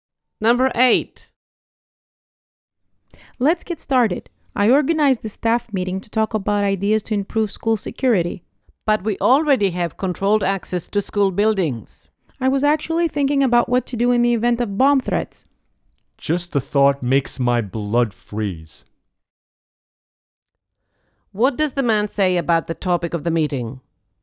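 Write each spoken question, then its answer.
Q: What does the man say about the topic of the meeting?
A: It frightens him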